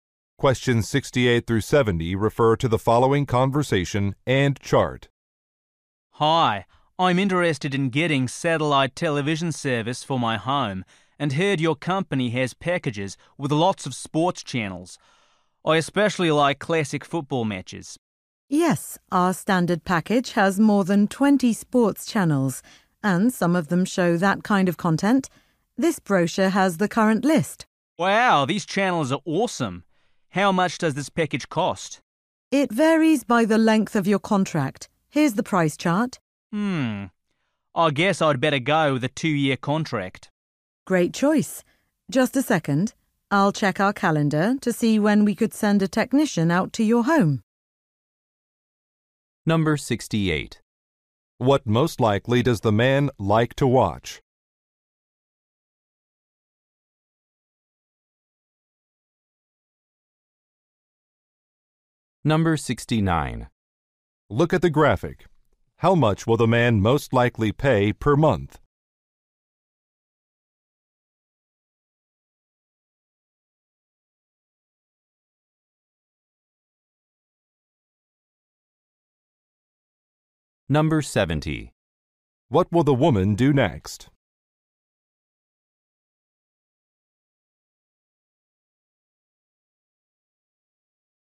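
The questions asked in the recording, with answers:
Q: What most likely does the man like to watch?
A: Classic football matches

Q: What will the woman do next?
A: Check the calendar to schedule a technician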